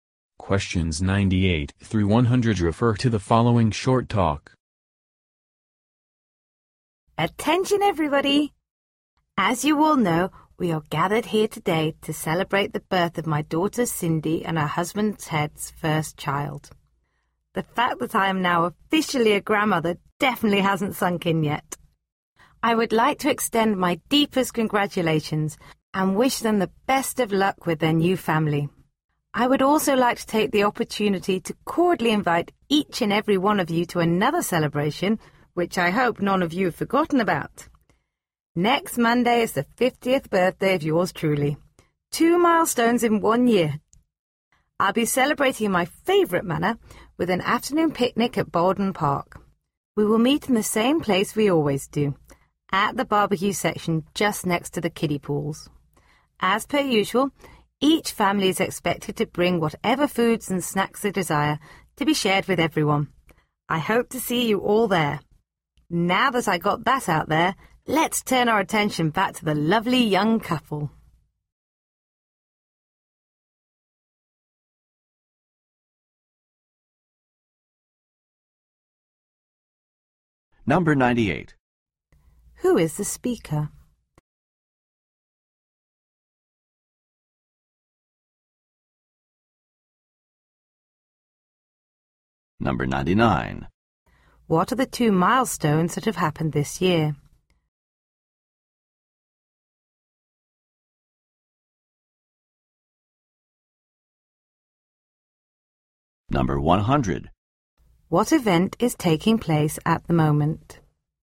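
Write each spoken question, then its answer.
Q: Who is the speaker?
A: Cindy's mother, a new grandmother

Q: What are the 2 milestones that have happened this year?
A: Becoming a grandmother and turning 50

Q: What event is taking place at the moment?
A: A celebration of the baby's birth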